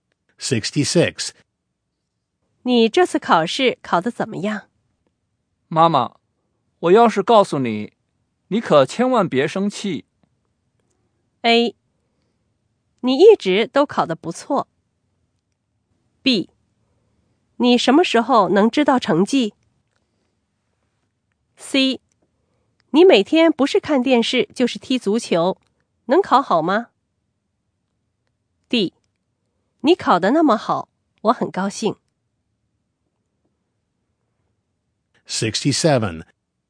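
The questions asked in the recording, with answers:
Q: 妈妈,我要是告诉你,你可千万别生气。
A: C: 你每天不是看电视就是踢足球,能考好吗?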